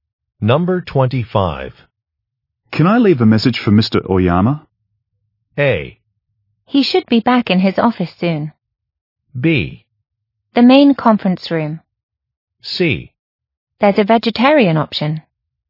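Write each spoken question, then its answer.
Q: Can I leave a message for Mr. Oyama?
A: A: He should be back in his office soon.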